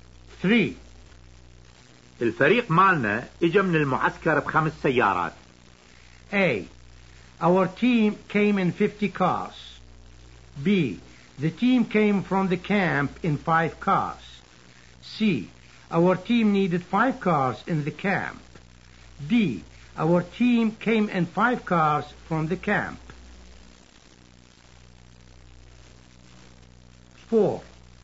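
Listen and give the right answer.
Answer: D: Our team came in 5 cars from the camp.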